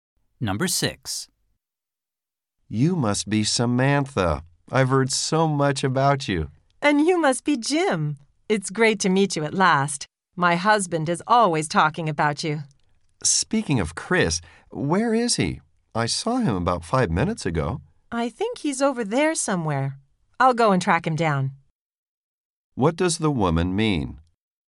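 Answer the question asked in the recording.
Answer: She will go and find Chris.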